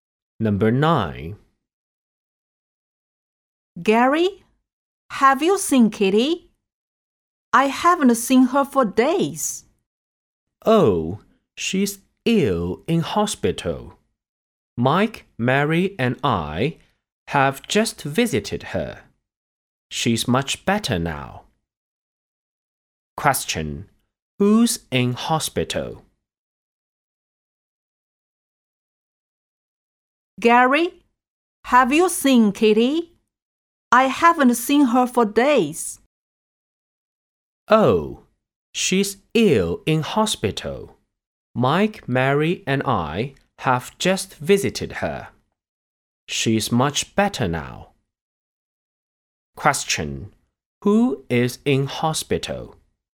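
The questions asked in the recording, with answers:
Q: Who is in hospital?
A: Kitty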